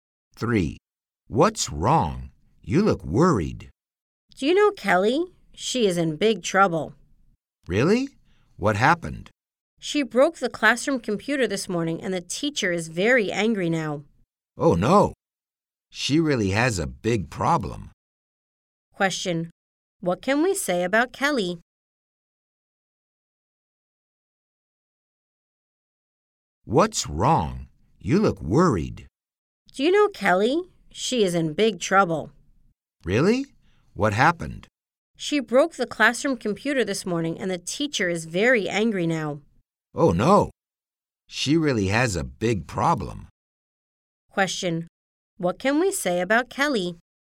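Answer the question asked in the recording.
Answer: She is in big trouble because she broke the classroom computer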